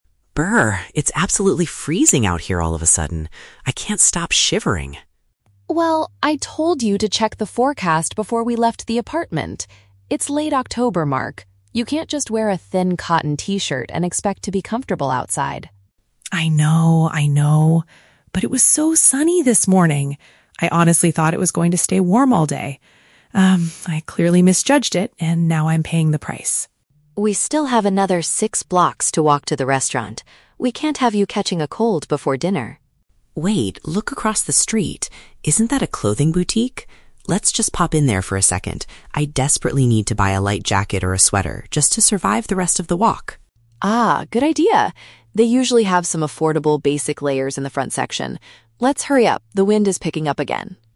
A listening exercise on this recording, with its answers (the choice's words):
Listen to the conversation between two friends walking down the street. For each question, choose the correct answer (A, B, or C).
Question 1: Why is Mark currently feeling so uncomfortable?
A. He is wearing clothing that is not suitable for the sudden drop in temperature.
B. He has already caught a bad cold because they walked too far.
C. He forgot to put on his heavy winter coat before leaving the restaurant.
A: He is wearing clothing that is not suitable for the sudden drop in temperature.

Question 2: Why did Mark choose to dress the way he did today?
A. The local news predicted a very hot and dry afternoon.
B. He assumed the bright, pleasant weather from earlier would last.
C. He didn't want to carry a thick jacket while walking a long distance.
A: He assumed the bright, pleasant weather from earlier would last.

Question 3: What is their immediate plan to solve the problem?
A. They will run the remaining six blocks to the restaurant to stay warm.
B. They will return to their apartment to grab some warmer clothes.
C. They will quickly visit a nearby shop to purchase an extra layer of clothing.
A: They will quickly visit a nearby shop to purchase an extra layer of clothing.

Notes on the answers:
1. Mark is freezing because he is wearing a "thin cotton t-shirt" despite the sudden cold wind. This is paraphrased as "clothing that is not suitable." Option B is a trap; Sarah mentions "catching a cold" as a future worry, but he doesn't have a cold yet. Option C is a trap; they are walking to the restaurant, not leaving it.
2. Mark explains that "it was so sunny this morning" and he thought "it was going to stay warm all day." This matches option B perfectly. Option A is a trap; Sarah scolds him because he didn't check the forecast. Option C is plausible for why people underdress, but it is never mentioned in the audio.
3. Mark suggests they "pop in" to a "clothing boutique" to buy a "light jacket or a sweater" (paraphrased as an extra layer of clothing). Option A is a trap; the "six blocks" to the restaurant are mentioned, but they don't plan to run. Option B is a trap; they left the "apartment" earlier, but they are not going back there.

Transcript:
It's absolutely freezing out here all of a sudden. I can't stop shivering.
Sarah: Well, I told you to check the forecast before we left the apartment! It's late October, Mark. You can't just wear a thin cotton t-shirt and expect to be comfortable outside.
Mark: I know, I know. But it was so sunny this morning. I honestly thought it was going to stay warm all day. Um, I clearly misjudged it, and now I'm paying the price.
Sarah: We still have another six blocks to walk to get to the restaurant. We can't have you catching a cold before dinner.
Mark: Wait, look across the street. Isn't that a clothing boutique? Let's just pop in there for a second. I desperately need to buy a light jacket or a sweater, just to survive the rest of the walk.
Sarah: Ah, good idea. They usually have some affordable basic layers in the front section. Let's hurry up, the wind is picking up again!